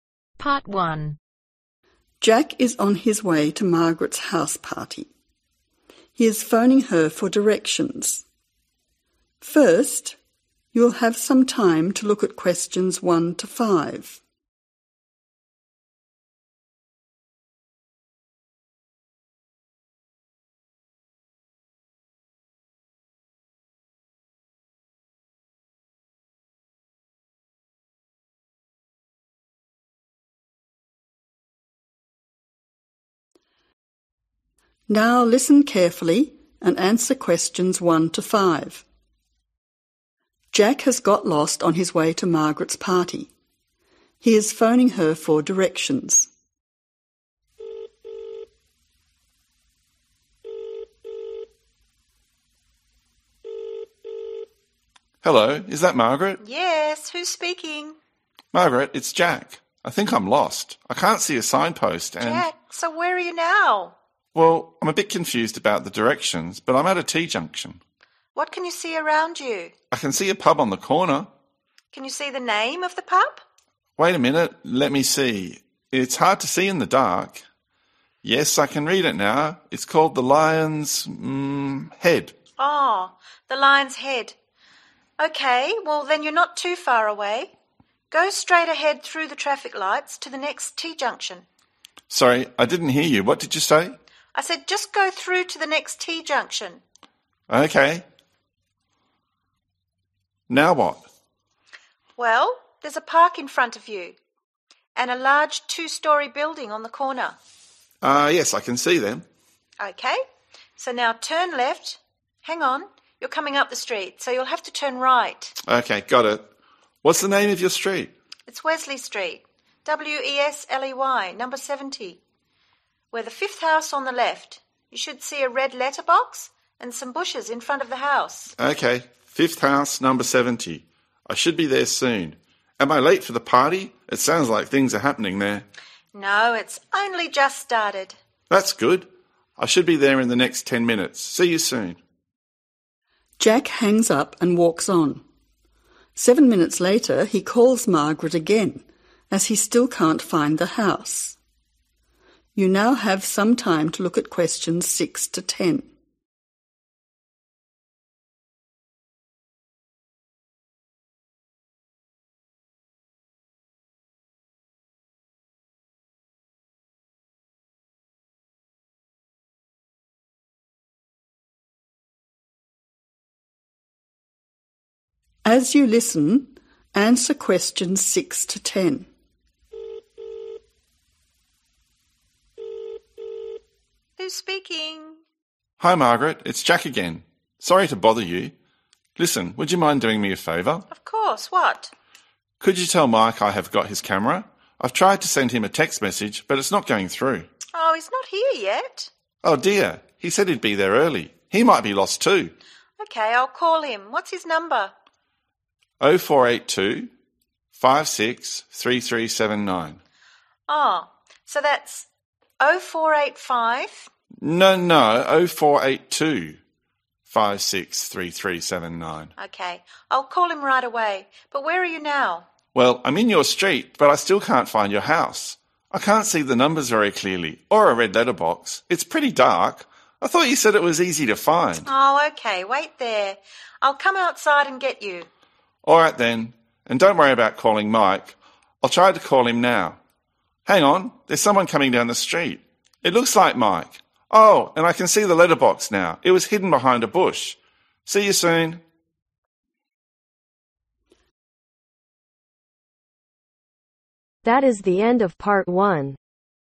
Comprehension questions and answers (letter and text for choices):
Choose the correct letter, A , B or C.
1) What is the name of the pub ?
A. The Lines Ahead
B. The Lion's Shed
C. The Lion's Head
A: C. The Lion's Head

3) Street: ............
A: WESLEY

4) Number: ............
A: 70

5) Location: ............ house on the left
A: FIFTH

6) Which statement is correct ?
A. Jack has got Mike's camera.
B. Mike has got Jack's camera.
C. Mike has sent Jack a text message.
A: A. Jack has got Mike's camera.

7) Jack is worried that Mike may be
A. late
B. lost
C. early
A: B. lost

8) 048 ............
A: 2563379